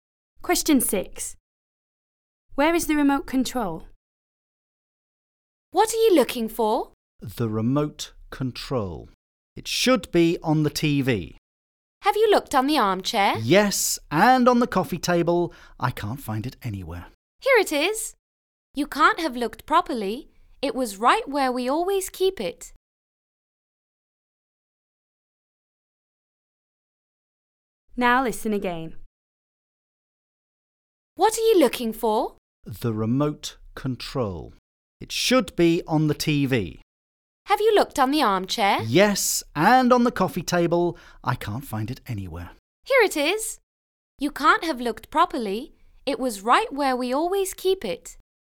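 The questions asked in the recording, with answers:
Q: Where is the remote control?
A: On the TV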